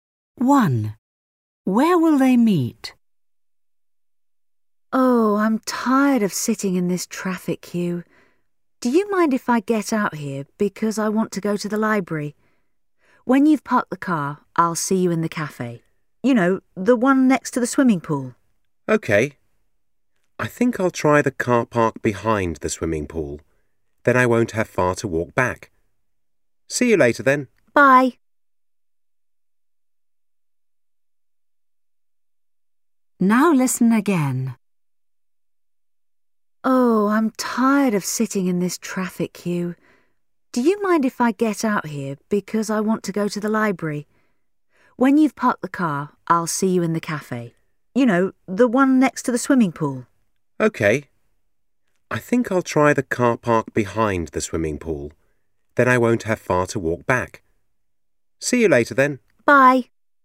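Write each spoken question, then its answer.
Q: Where will they meet?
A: In the cafe next to the swimming pool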